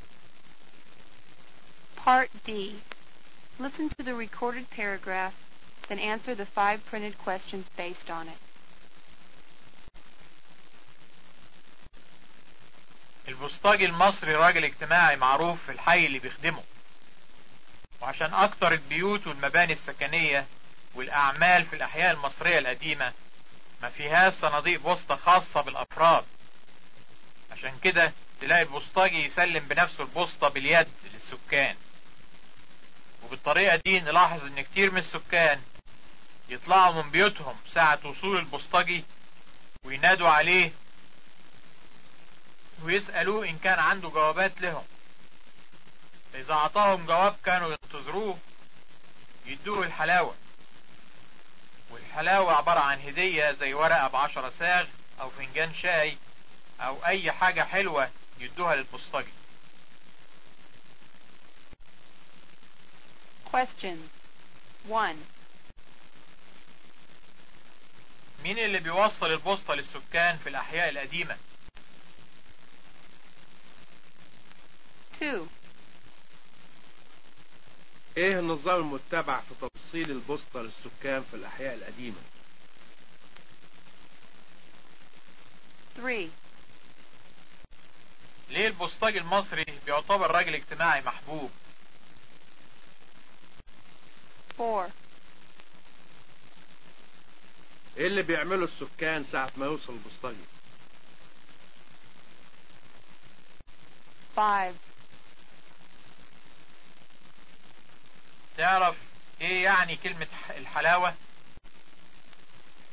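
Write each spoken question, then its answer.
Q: مين اللي بيوصل البوسطة للسكان في الأحياء القديمة؟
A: البوسطجي

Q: إيه النظام المتبع في توصيل البوسطة للسكان في الأحياء القديمة؟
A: البوسطجي بيسلم البوسطة باليد للسكان بنفسه

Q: ايه اللي بيعمله السكان ساعة ما يوصل البسطجي؟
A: يطلعوا من بيوتهم وينادوا عليه ويسألوه ان كان عنده جوابات لهم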